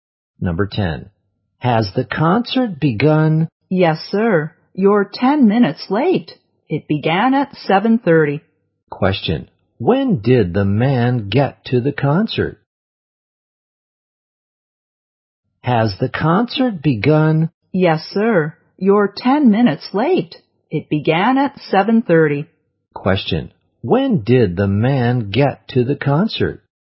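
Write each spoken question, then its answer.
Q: When did the man get to the concert?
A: At 7:40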